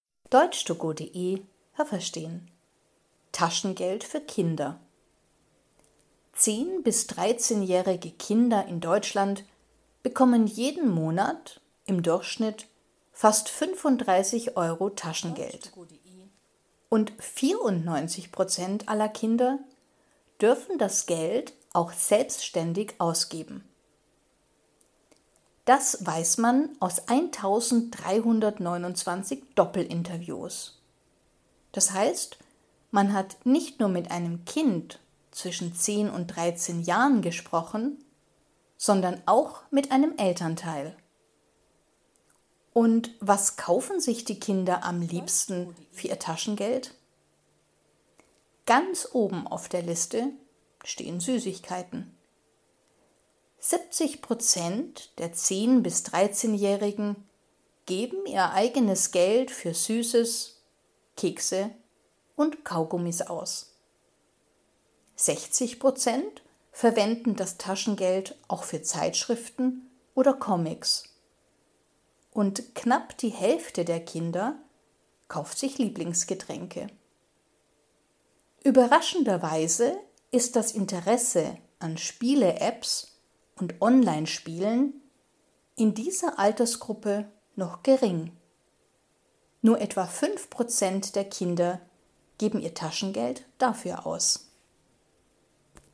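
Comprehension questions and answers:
Was haben Sie gehört? Es gibt nur eine korrekte Antwort.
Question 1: 10- bis 13-jährige Kinder bekommen im Monat durchschnittlich _____ Taschengeld.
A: fast 35 Euro

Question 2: _____ dürfen selbst entscheiden, was sie mit dem Geld machen.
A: 94% aller Kinder

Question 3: Man interviewte ein Kind und ...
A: einen Elternteil

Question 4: Die Kinder kaufen für ihr Taschengeld am liebsten ...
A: Süßigkeiten

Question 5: Was kaufen die Kinder am zweitliebsten?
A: Zeitschriften oder Comics

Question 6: 10- bis 13-jährige Kinder interessieren sich _____ für Spiele-Apps und Online-Spiele.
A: noch wenig

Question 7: Für ihr Taschengeld kaufen _____ der Kinder Spiele-Apps oder Online-Spiele.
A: nur etwa 5%

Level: Hörtexte A (einfach)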